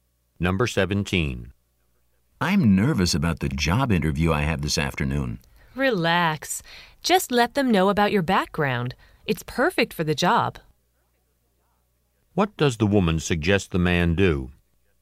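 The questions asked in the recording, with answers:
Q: What does the woman suggest the man do?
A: Tell the interviewers about his background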